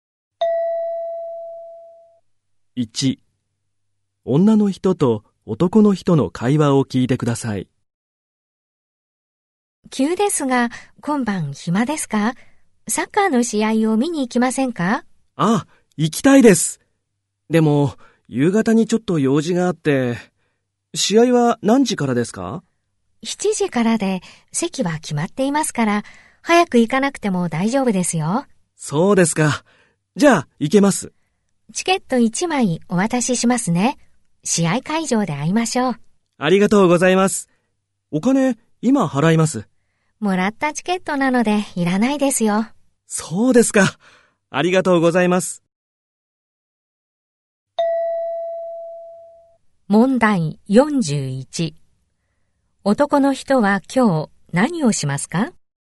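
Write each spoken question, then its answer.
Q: 男の人は今日、何をしますか?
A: 用事の後、サッカーの試合を見に行く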